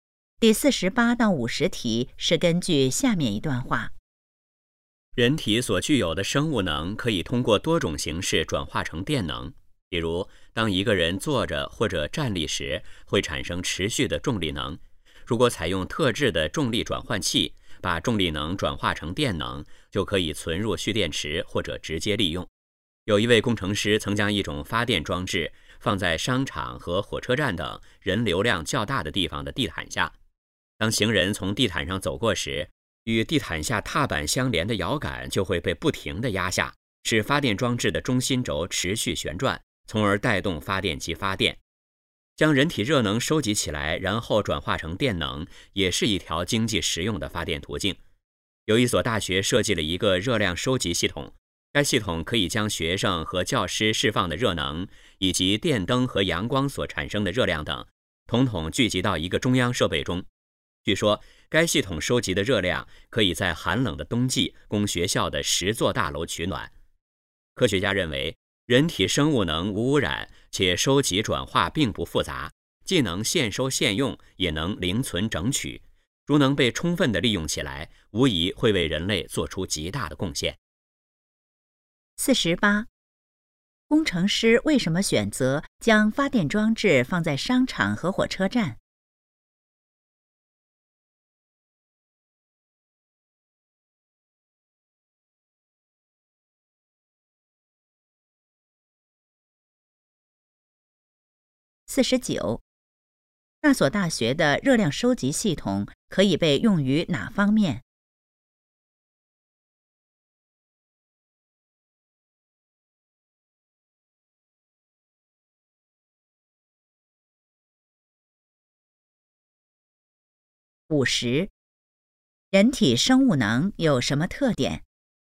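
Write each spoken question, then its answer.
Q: 工程师为什么选择将发电装置放在商场和火车站?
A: 人流量较大

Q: 那所大学的热量收集系统可以被用于哪方面?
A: 冬季给学校大楼取暖

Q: 人体生物能有什么特点?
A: 无污染,收集转化不复杂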